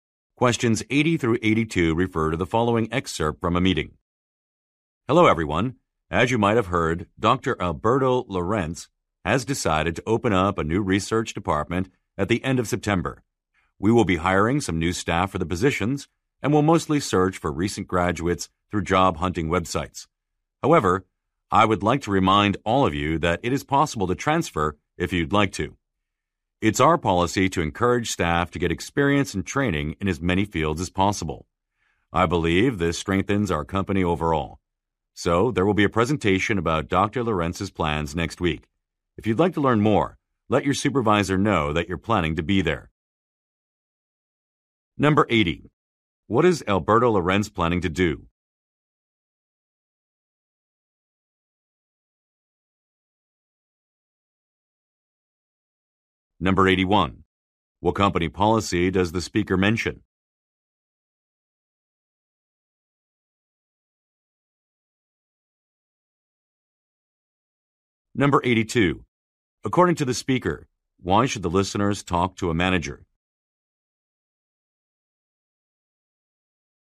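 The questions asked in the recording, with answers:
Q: What is Alberto Lorenz planning to do?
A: Open a new research department

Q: What company policy does the speaker mention?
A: Encouraging staff to gain experience in many fields

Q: According to the speaker, why should the listeners talk to a manager?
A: To attend the presentation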